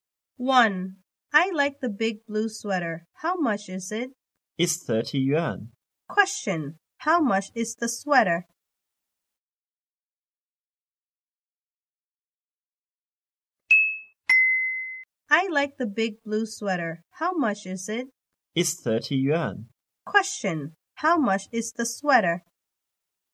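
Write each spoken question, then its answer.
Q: How much is the sweater?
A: 30 yuan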